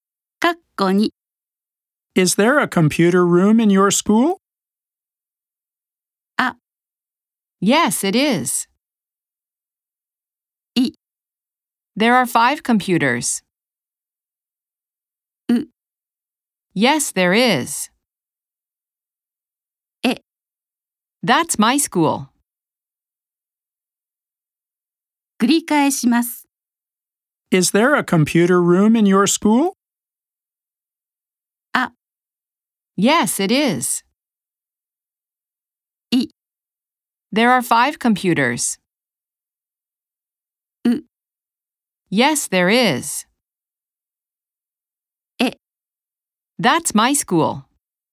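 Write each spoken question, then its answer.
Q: Is there a computer room in your school?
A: C: Yes, there is.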